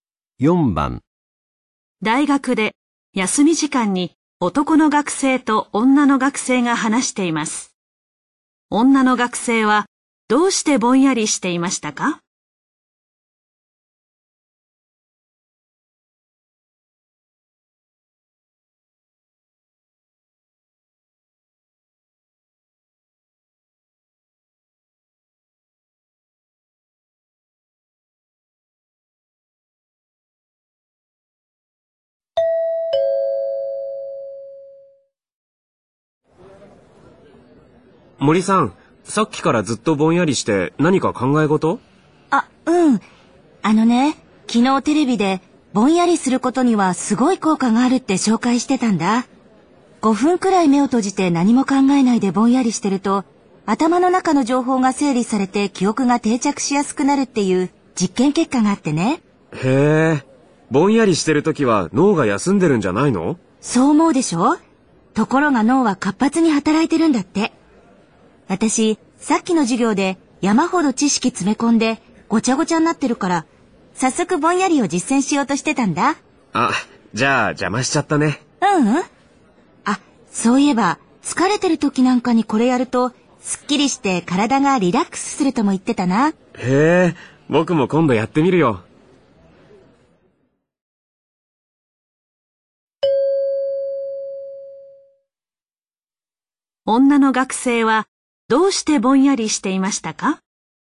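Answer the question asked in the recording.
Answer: 授業で詰め込んだ知識を頭の中で整理するため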